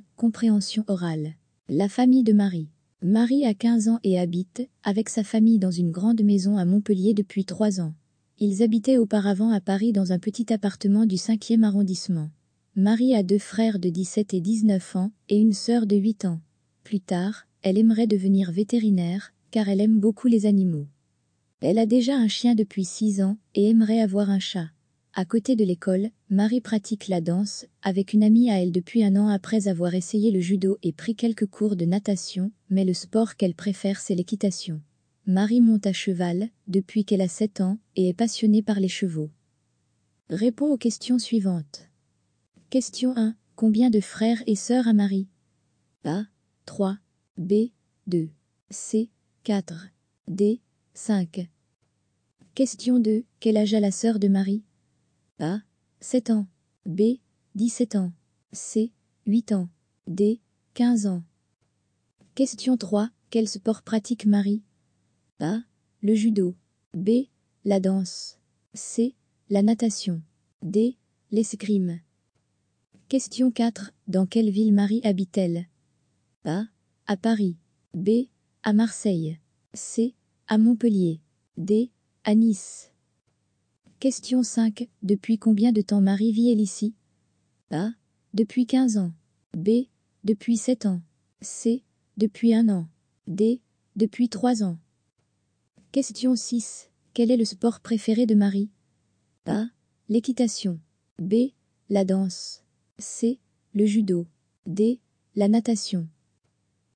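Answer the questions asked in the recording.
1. A: 3
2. C: 8 ans
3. B: La danse
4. C: À Montpellier
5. D: Depuis 3 ans
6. A: L'équitation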